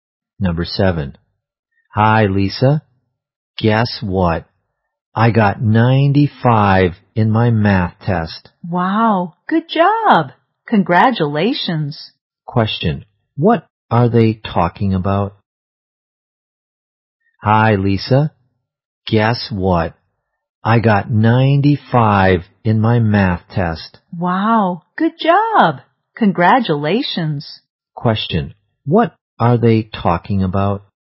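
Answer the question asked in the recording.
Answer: A math test.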